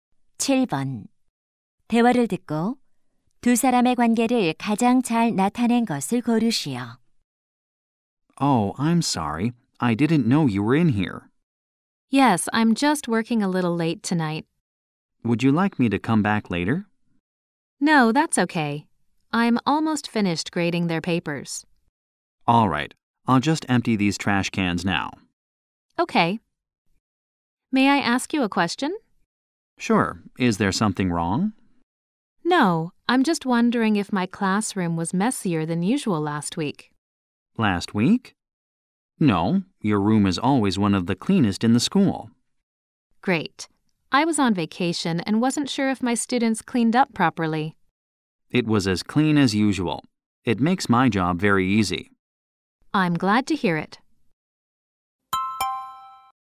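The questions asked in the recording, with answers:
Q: 대화를 듣고 두 사람의 관계를 가장 잘 나타낸 것을 고르시오.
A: 교사 - 학교 청소부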